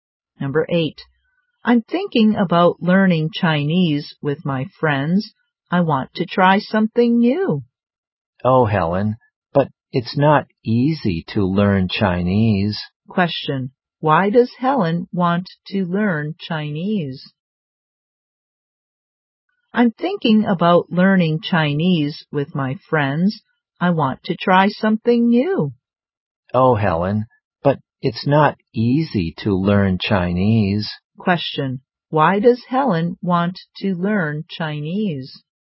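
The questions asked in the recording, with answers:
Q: Why does Helen want to learn Chinese?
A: She wants to try something new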